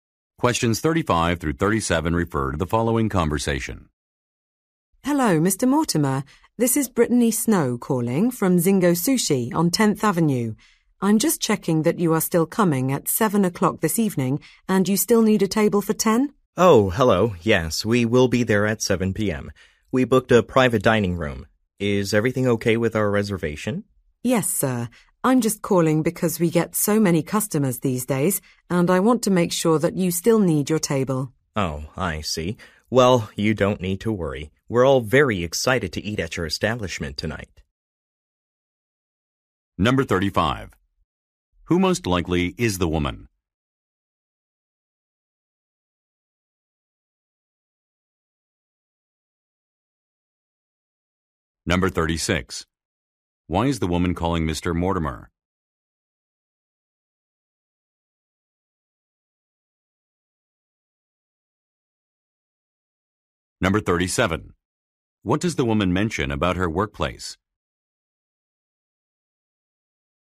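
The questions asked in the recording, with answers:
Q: Who most likely is the woman?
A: A restaurant employee

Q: Why is the woman calling Mr. Mortimer?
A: To confirm his reservation

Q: What does the woman mention about her workplace?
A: It gets many customers these days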